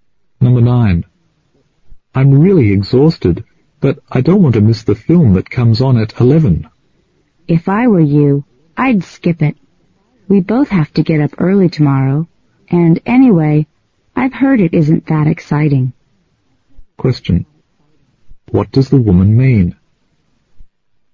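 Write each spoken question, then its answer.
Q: What does the woman mean?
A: He should skip the film and get some sleep.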